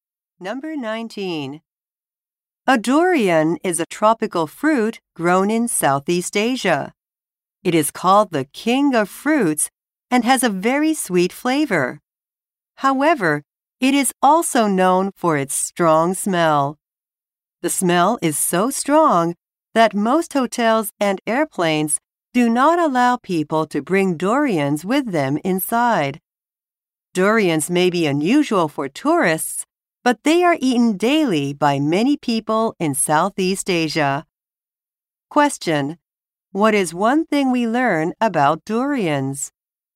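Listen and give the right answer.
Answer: They have a strong smell and many hotels and airplanes don't allow them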